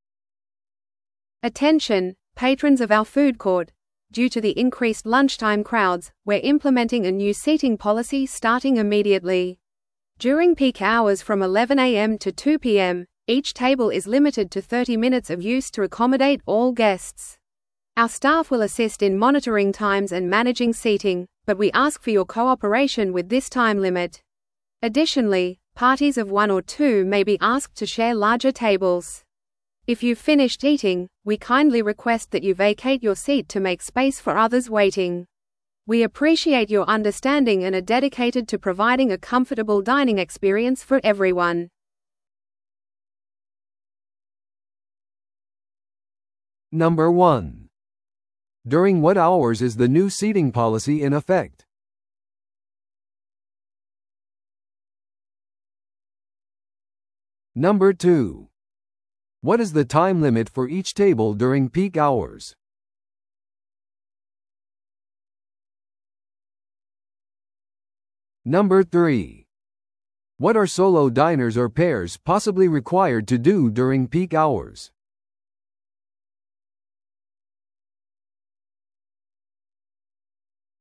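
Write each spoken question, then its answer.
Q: During what hours is the new seating policy in effect?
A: From 11 a.m. to 2 p.m.

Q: What is the time limit for each table during peak hours?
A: 30 minutes

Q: What are solo diners or pairs possibly required to do during peak hours?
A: Share larger tables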